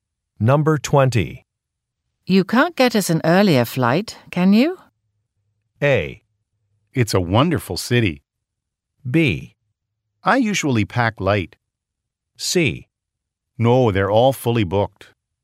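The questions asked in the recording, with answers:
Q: You can't get us an earlier flight, can you?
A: C: No, they're all fully booked.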